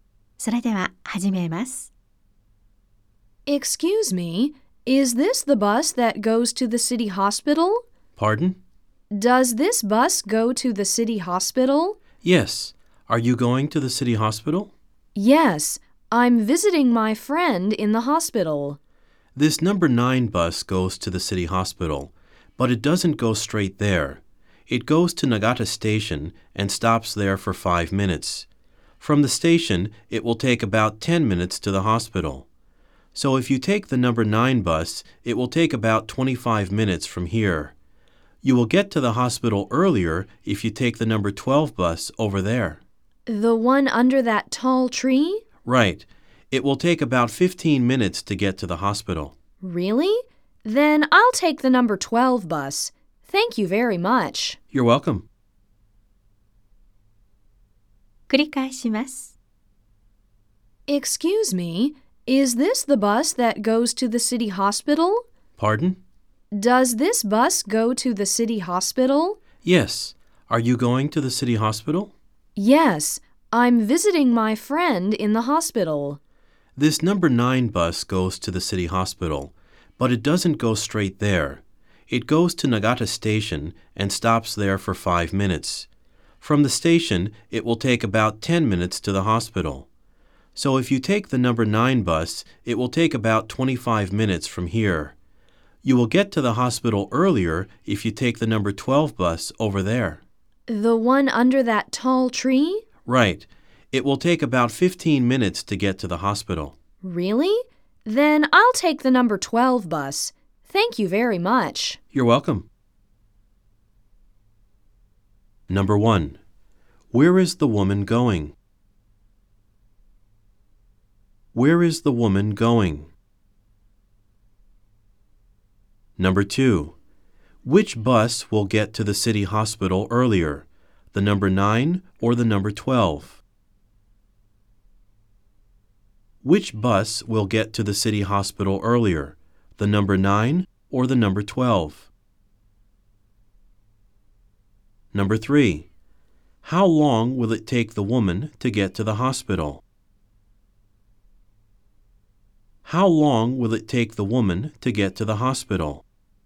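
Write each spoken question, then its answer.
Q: Where is the woman going?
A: To the city hospital

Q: Which bus will get to the city hospital earlier, the number 9 or the number 12?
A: The number 12 bus

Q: How long will it take the woman to get to the hospital?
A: About 15 minutes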